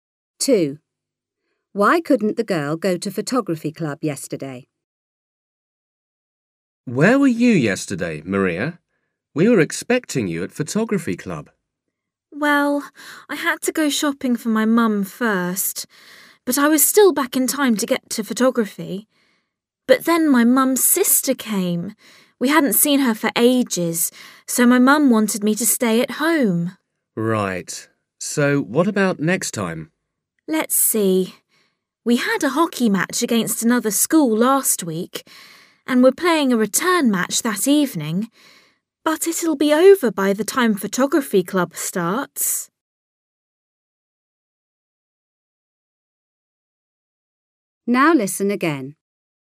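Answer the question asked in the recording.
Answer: Her aunt (her mum's sister) came to visit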